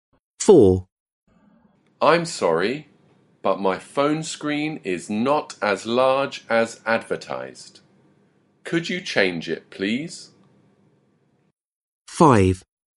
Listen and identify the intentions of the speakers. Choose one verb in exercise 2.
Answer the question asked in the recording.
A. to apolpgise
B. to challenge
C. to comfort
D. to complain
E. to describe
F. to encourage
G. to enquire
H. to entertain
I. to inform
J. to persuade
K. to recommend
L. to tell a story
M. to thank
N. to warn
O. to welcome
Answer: D. to complain

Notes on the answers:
I'm sorry but my phone screen is not as large as advertised. Could you change it, please?

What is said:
4. I'm sorry but my phone screen is not as large as advertised. Could you change it, please?

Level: Lớp 10